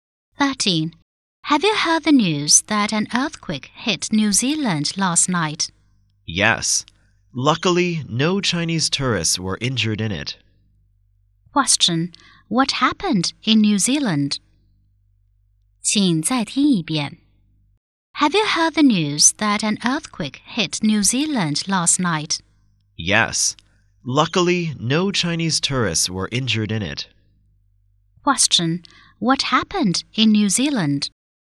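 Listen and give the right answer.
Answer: An earthquake hit it.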